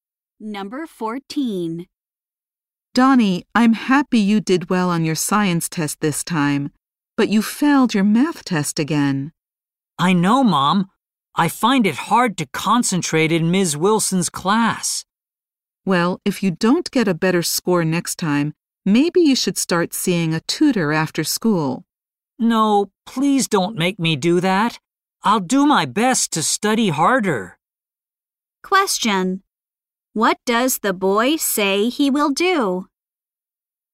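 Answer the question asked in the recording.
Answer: Study harder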